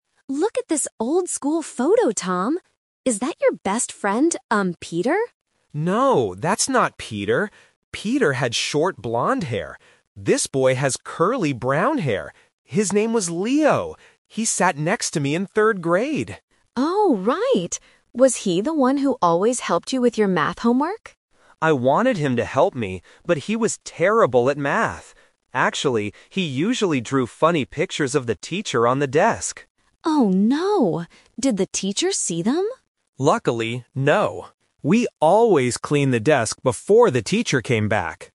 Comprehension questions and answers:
Listen to a brother and sister looking at an old school photo. Then, read the questions below and choose the correct answer (A, B, or C) for each question.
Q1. What is the name of the boy in the photo?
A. Peter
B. Leo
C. Tom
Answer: B. Leo

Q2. What did the boy in the photo look like?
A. He had short blond hair.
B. He had curly brown hair.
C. He had long black hair.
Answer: B. He had curly brown hair.

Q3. What did Leo usually do in class?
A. He helped Tom with math.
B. He cleaned the classroom.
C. He drew funny pictures.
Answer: C. He drew funny pictures.

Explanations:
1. Tom says about the boy in the photo, "His name was Leo!". Option (A) is a trap; Emma guesses the boy is Peter, but Tom says "No, that's not Peter." Option (C) is the speaker's name, not the boy in the picture.
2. Tom describes Leo by saying, "This boy has curly brown hair." Option (A) is a trap; short blond hair was Peter's appearance, not Leo's. Option (C) is a plausible hair description but is never mentioned in the audio.
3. Tom says that Leo "usually drew funny pictures of the teacher on the desk." Option (A) is a trap; Emma asks if Leo helped with math, and Tom says he wanted him to, but Leo was terrible at it. Option (B) is a trap; they cleaned the desk to hide the pictures, but Leo didn't clean the whole classroom.

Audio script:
Emma: Look at this old school photo, Tom! Is that your best friend... um, Peter?
Tom: No, that's not Peter. Peter had short blond hair. This boy has curly brown hair. His name was Leo! He sat next to me in third grade.
Emma: Oh, right! Was he the one who always helped you with your math homework?
Tom: I wanted him to help me, but he was terrible at math. Actually, he usually drew funny pictures of the teacher on the desk.
Emma: Oh no! Did the teacher see them?
Tom: Luckily, no. We always cleaned the desk before the teacher came back!

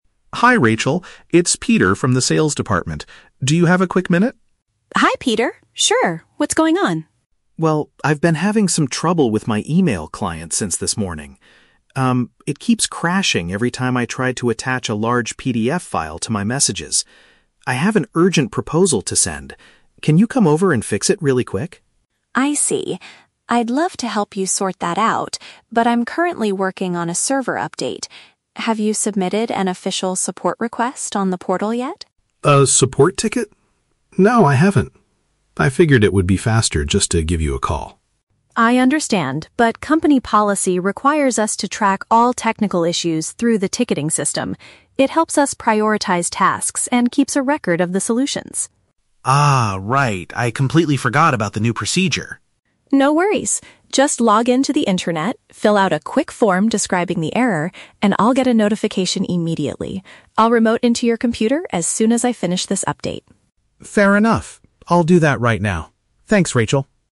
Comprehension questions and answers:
Listen to the phone conversation between an employee and an IT technician, then choose the correct answer (A, B, or C).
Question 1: What is the main problem Peter is experiencing?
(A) He cannot connect to the company's main server.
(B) His communication software closes unexpectedly when adding documents.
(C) He forgot his password for the sales department portal.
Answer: (B) His communication software closes unexpectedly when adding documents.

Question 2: What does Rachel ask Peter to do before she can help him?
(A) Wait for her to finish fixing another employee's laptop.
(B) Bring his computer directly to the IT department.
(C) Register his technical issue on the internal company platform.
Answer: (C) Register his technical issue on the internal company platform.

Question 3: What is the main reason for using the ticketing system according to Rachel?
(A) It allows the management to see how many hours the IT staff works.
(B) It helps the IT team organize their workload and document the fixes.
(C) It is a much faster way to communicate than making a phone call.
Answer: (B) It helps the IT team organize their workload and document the fixes.

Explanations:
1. The script uses paraphrasing. Peter says his "email client" (communication software) "keeps crashing" (closes unexpectedly) when he tries to "attach a large PDF file" (adding documents).
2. Rachel asks if he has "submitted an official support request on the portal" and later tells him to "log into the intranet, fill out a quick form". Option C perfectly paraphrases this action.
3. Rachel explains that the system helps them "prioritize tasks" (organize their workload) and "keeps a record of the solutions" (document the fixes).

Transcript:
Peter: Hi Rachel. It's Peter from the sales department. Do you have a quick minute?
Rachel: Hi Peter. Sure, what's going on?
Peter: Well, I've been having some trouble with my email client since this morning. Um, it keeps crashing every time I try to attach a large PDF file to my messages. I have an urgent proposal to send. Can you come over and fix it really quick?
Rachel: I see. I'd love to help you sort that out, but I'm currently working on a server update. Have you submitted an official support request on the portal yet?
Peter: A support ticket? No, I haven't. I figured it would be faster just to give you a call.
Rachel: I understand, but company policy requires us to track all technical issues through the ticketing system. It helps us prioritize tasks and keeps a record of the solutions.
Peter: Ah, right. I completely forgot about the new procedure.
Rachel: No worries. Just log into the intranet, fill out a quick form describing the error, and I'll get a notification immediately. I'll remote into your computer as soon as I finish this update.

